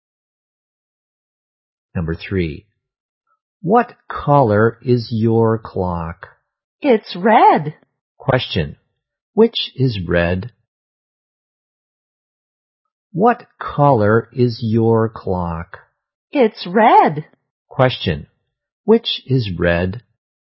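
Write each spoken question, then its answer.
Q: Which is red?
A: The clock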